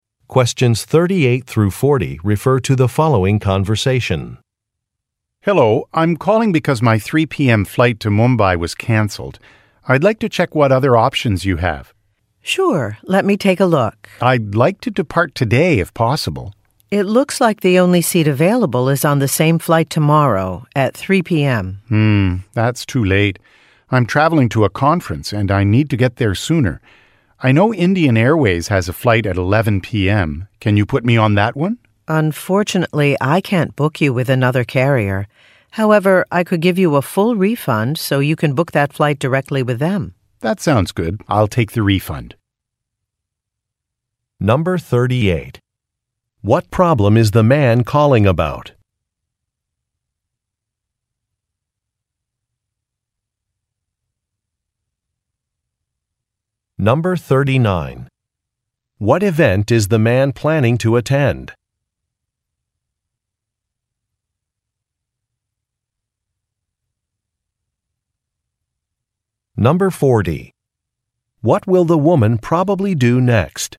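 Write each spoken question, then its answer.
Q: What problem is the man calling about?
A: His flight to Mumbai was canceled.

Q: What event is the man planning to attend?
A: A conference

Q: What will the woman probably do next?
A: Give him a full refund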